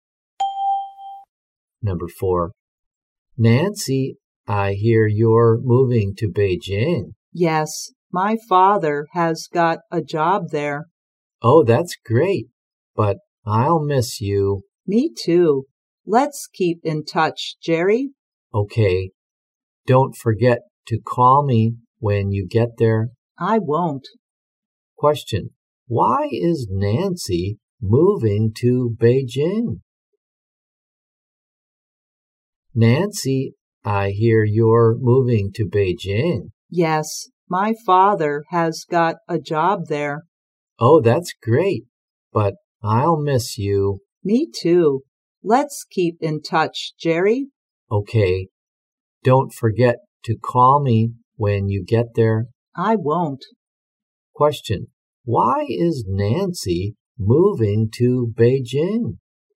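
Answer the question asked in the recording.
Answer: Her father has got a job there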